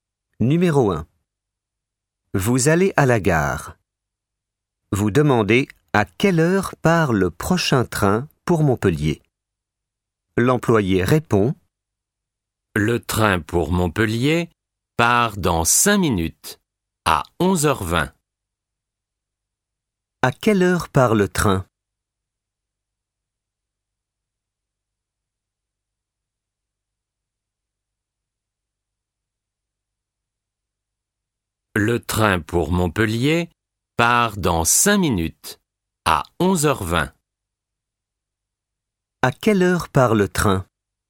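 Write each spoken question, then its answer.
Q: À quelle heure part le train ?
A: À 11h20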